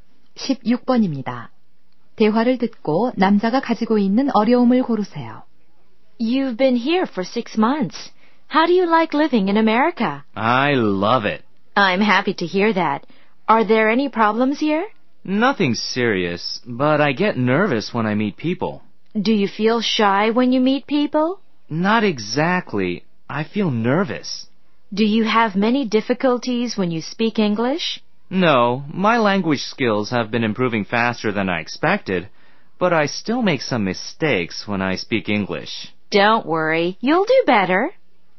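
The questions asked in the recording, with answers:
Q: 대화를 듣고 남자가 가지고 있는 어려움을 고르세요.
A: 사람을 만날 때 긴장함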